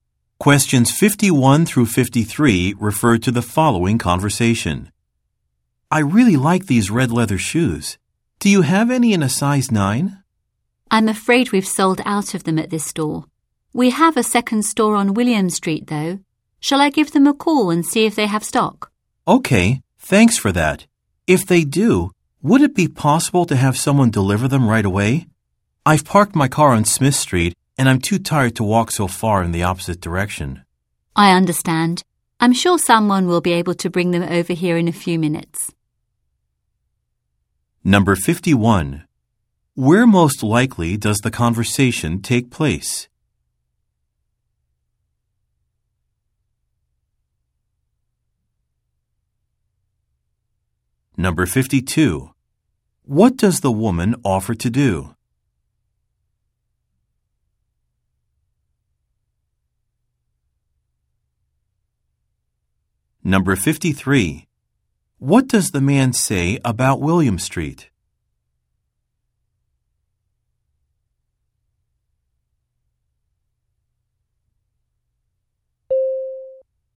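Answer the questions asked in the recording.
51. In a shoe store
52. Call the other store to see if they have the shoes in stock
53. It is too far away, in the opposite direction from where he parked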